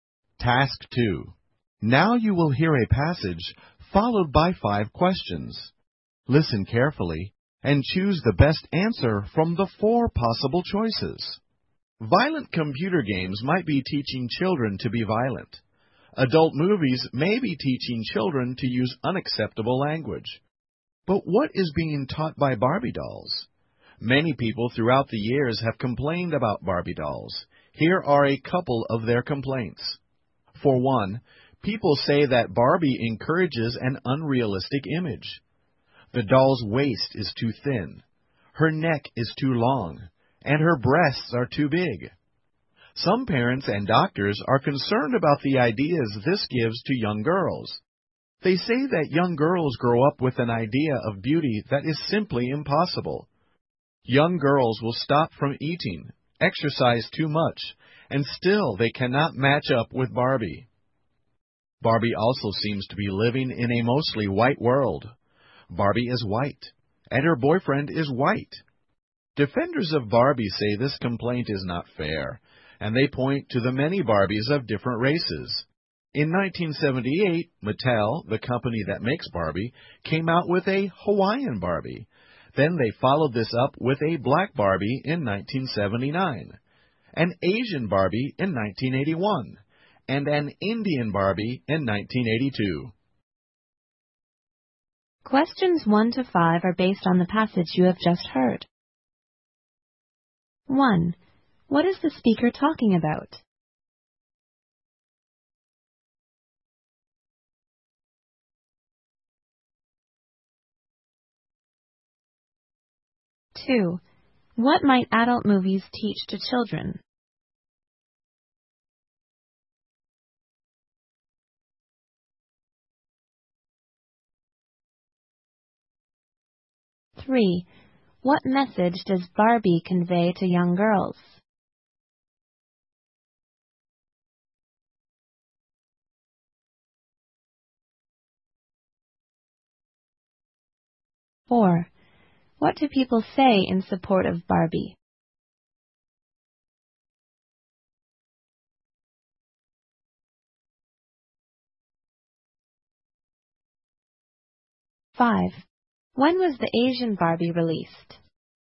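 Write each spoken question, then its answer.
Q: What is the speaker talking about?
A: Complaints about Barbie dolls

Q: What might adult movies teach to children?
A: To use unacceptable language

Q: What message does Barbie convey to young girls?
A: An unrealistic idea of beauty

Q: What do people say in support of Barbie?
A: There are many Barbies of different races

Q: When was the Asian Barbie released?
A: In 1981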